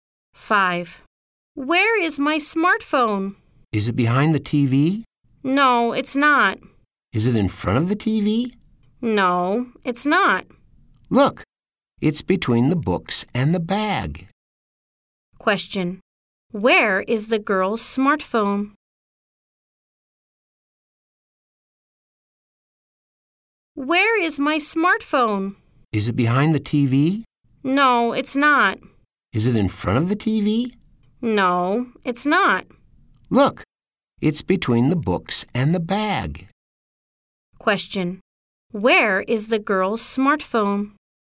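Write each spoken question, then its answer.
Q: Where is the girl's smartphone?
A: Between the books and the bag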